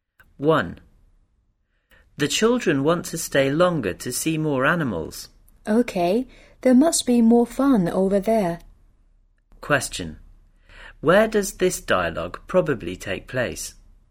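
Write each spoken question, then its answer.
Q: Where does this dialogue probably take place?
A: At a zoo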